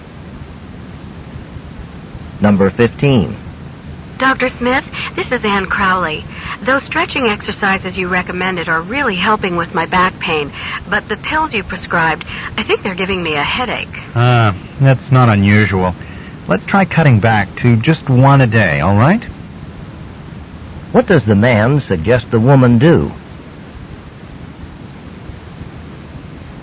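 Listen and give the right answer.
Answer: Take only one pill a day.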